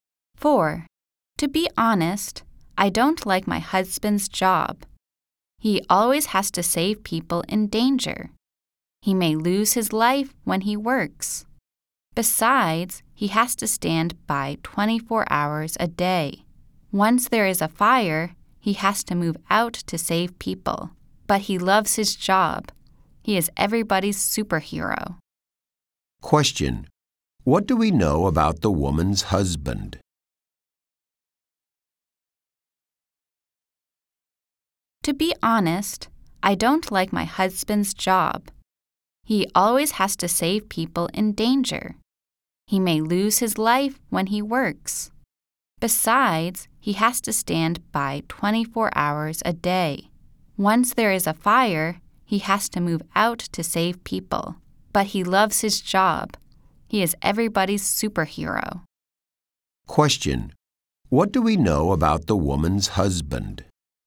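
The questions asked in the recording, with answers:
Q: What do we know about the woman's husband?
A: He is a firefighter who loves his job.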